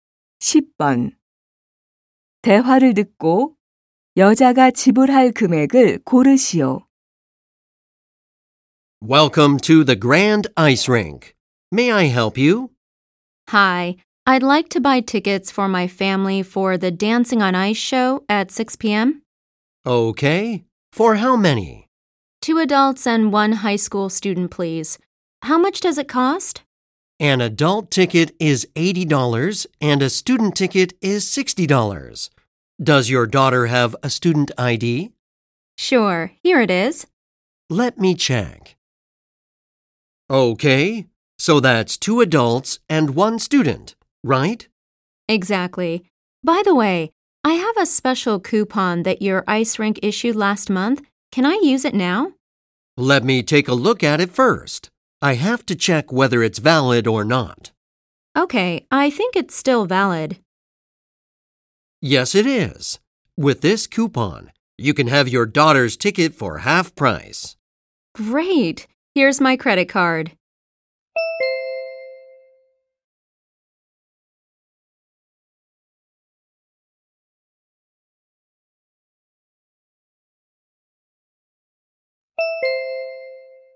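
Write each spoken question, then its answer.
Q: 대화를 듣고 여자가 지불할 금액을 고르시오.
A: $190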